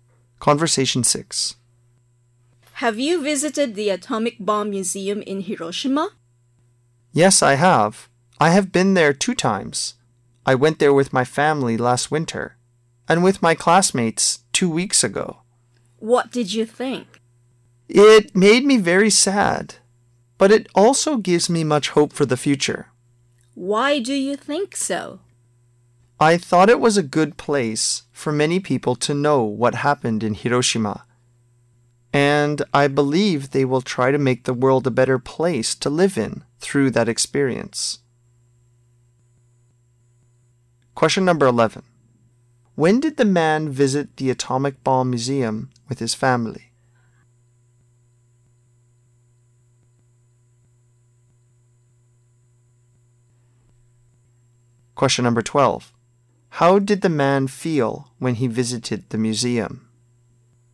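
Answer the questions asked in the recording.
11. Last winter
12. Very sad, but hopeful for the future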